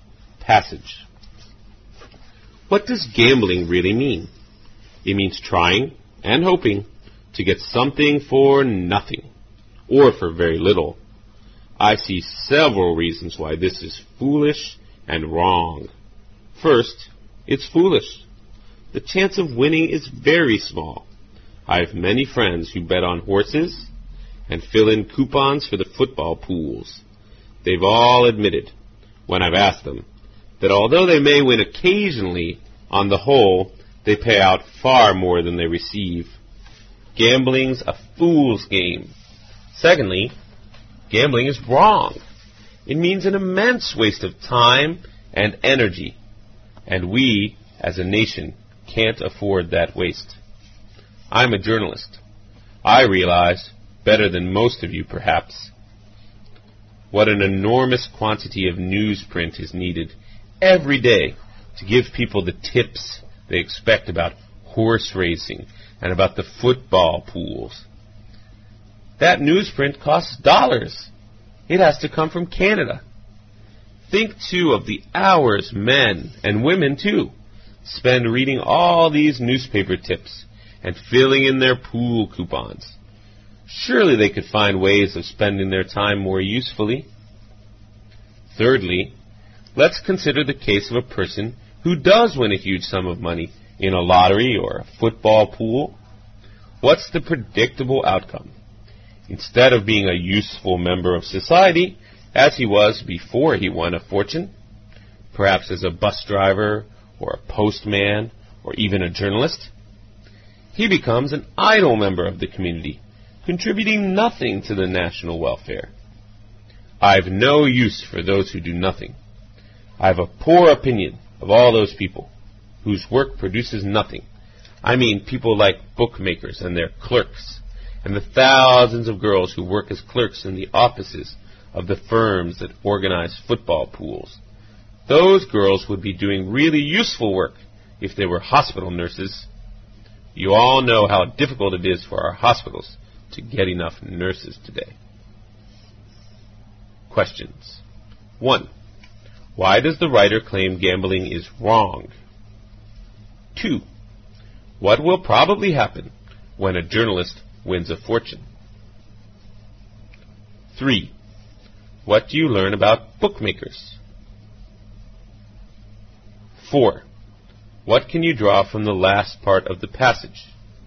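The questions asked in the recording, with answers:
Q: Why does the writer claim gambling is wrong?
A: It wastes a great deal of time and energy

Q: What will probably happen when a journalist wins a fortune?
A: He will become an idle member of the community

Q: What do you learn about bookmakers?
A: Their work produces nothing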